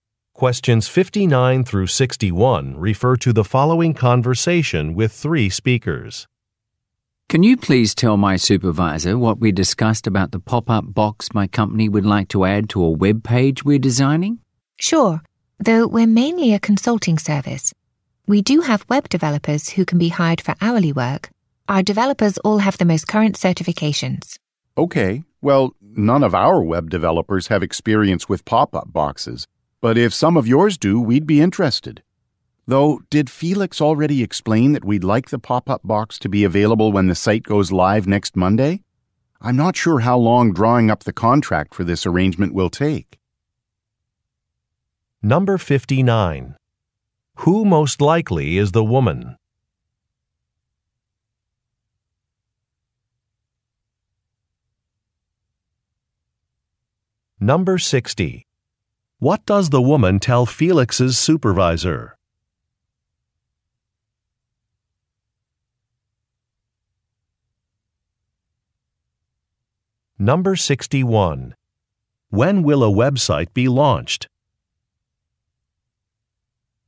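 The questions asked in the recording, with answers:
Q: When will a website be launched?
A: Next Monday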